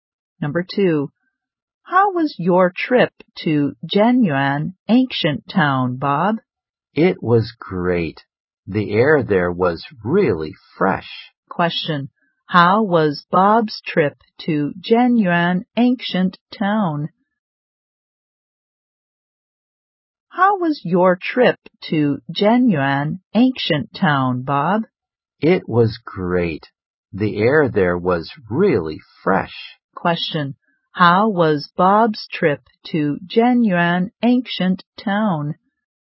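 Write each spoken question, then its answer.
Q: How was Bob's trip to Zhenyuan Ancient Town?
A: It was great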